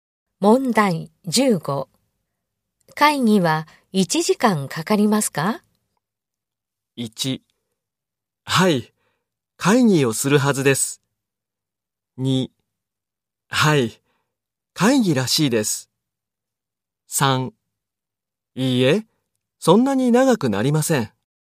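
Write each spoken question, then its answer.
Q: 会議は1時間かかりますか?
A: 3: いいえ、そんなに長くなりません。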